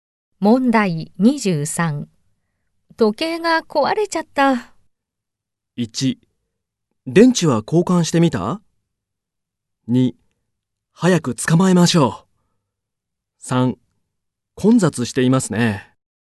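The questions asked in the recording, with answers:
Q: 時計が壊れちゃった。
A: 1: 電池は交換してみた?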